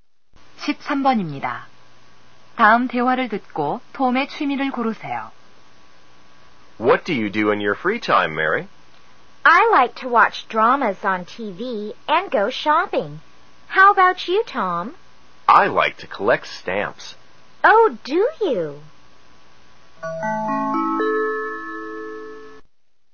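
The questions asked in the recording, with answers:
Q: 다음 대화를 듣고 톰의 취미를 고르세요.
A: 우표 수집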